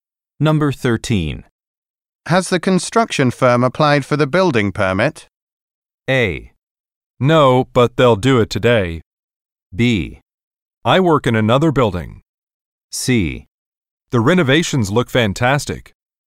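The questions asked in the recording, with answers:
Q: Has the construction firm applied for the building permit?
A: A: No, but they'll do it today.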